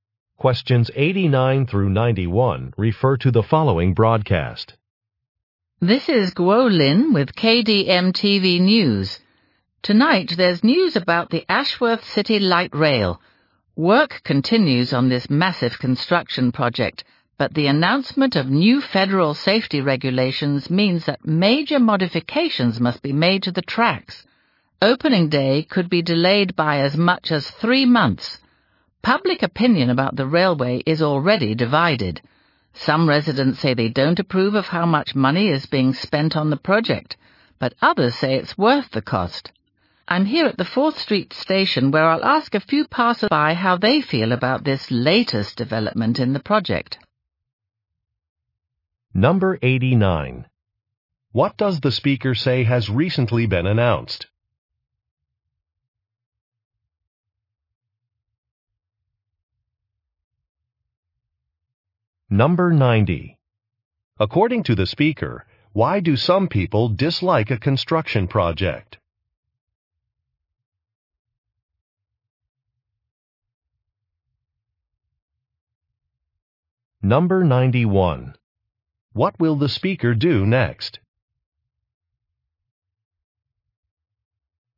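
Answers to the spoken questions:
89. New federal safety regulations
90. It costs too much money
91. Interview passers-by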